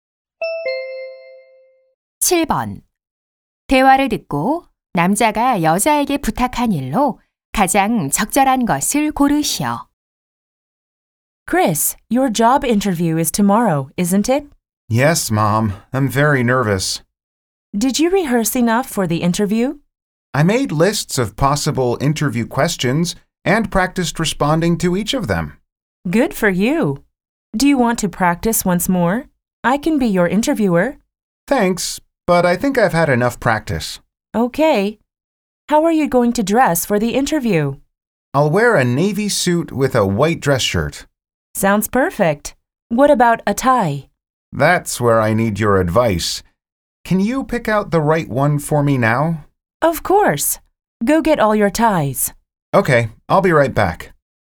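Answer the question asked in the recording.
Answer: 면접용 넥타이 골라 주기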